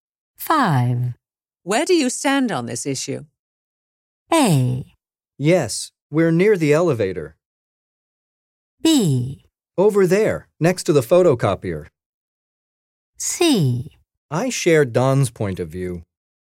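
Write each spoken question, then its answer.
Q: Where do you stand on this issue?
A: C: I share Don's point of view.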